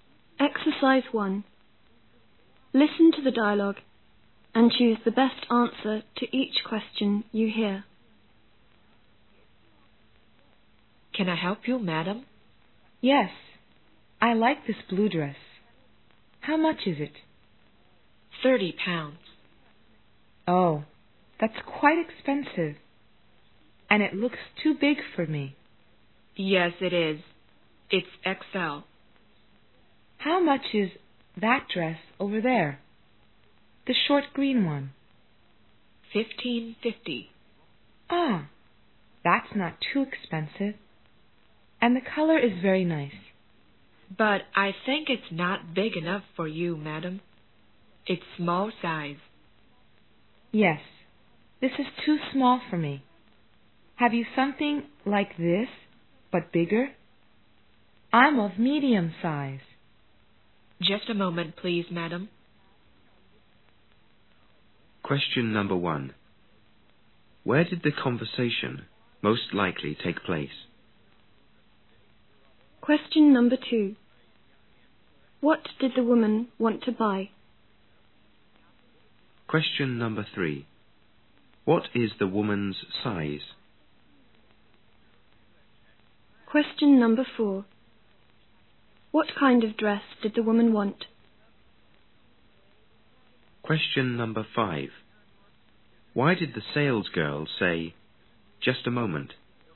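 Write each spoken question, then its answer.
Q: Where did the conversation most likely take place?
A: In a clothes shop

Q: What did the woman want to buy?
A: A dress

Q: What is the woman's size?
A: Medium

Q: What kind of dress did the woman want?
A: One like the short green one, but bigger (medium size)

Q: Why did the sales girl say, "Just a moment"?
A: She was going to look for a bigger (medium) dress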